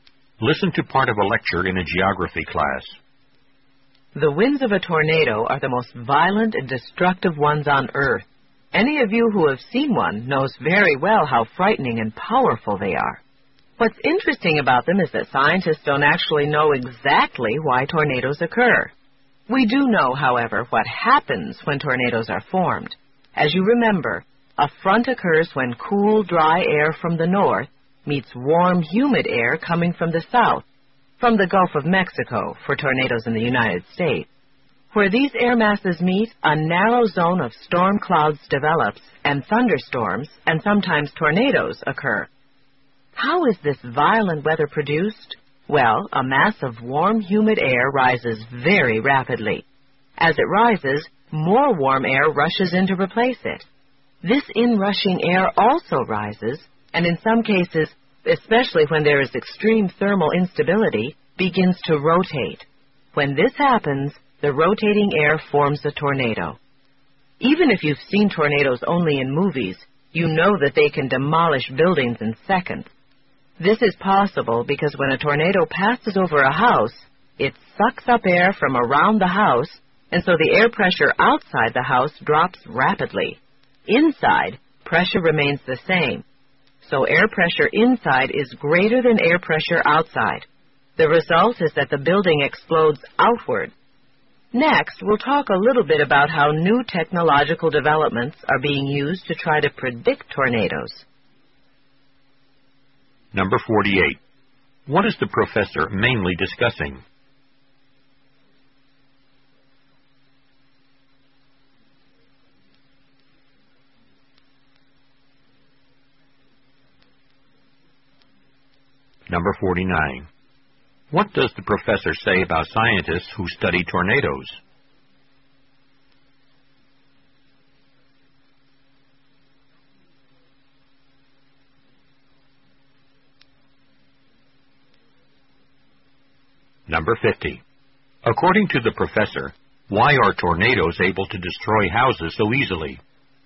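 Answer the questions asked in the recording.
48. How tornadoes form and why they are destructive
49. They don't know exactly why tornadoes occur
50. Air pressure outside drops so the higher pressure inside makes the house explode outward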